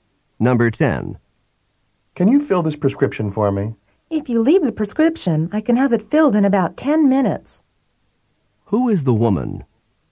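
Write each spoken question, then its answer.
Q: Who is the woman?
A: A pharmacist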